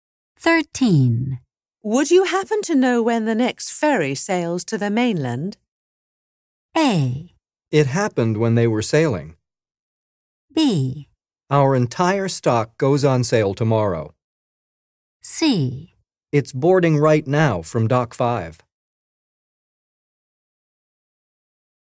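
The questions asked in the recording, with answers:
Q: Would you happen to know when the next ferry sails to the mainland?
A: C: It's boarding right now from Dock 5.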